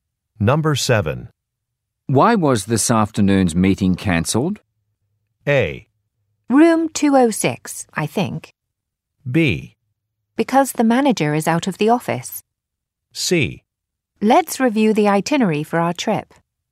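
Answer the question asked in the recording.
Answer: B: Because the manager is out of the office.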